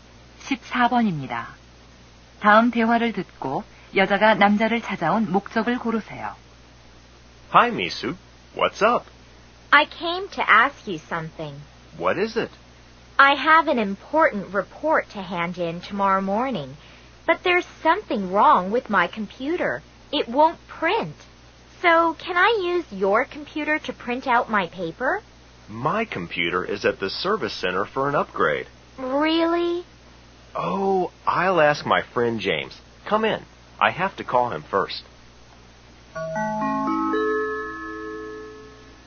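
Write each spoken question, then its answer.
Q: 다음 대화를 듣고 여자가 남자를 찾아온 목적을 고르세요.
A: 보고서를 출력하려고 컴퓨터를 빌리려고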